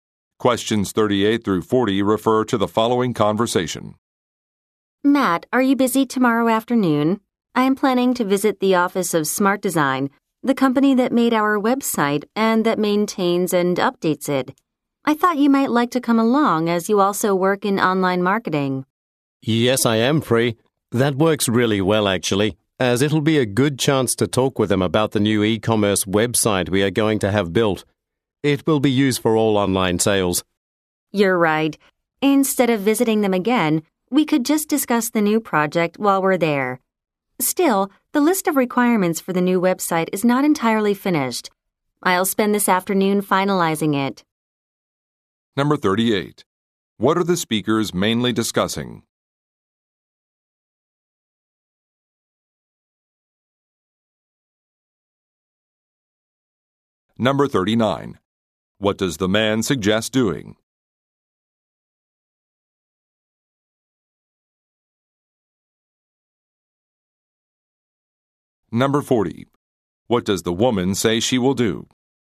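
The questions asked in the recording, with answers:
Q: What are the speakers mainly discussing?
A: A visit to the web design company

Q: What does the man suggest doing?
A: Discussing the new e-commerce website during the visit

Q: What does the woman say she will do?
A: Finish the list of requirements for the new website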